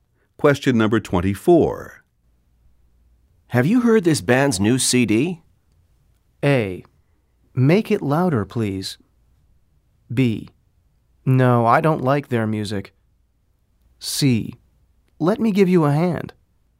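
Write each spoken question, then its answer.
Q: Have you heard this band's new CD?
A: B: No, I don't like their music.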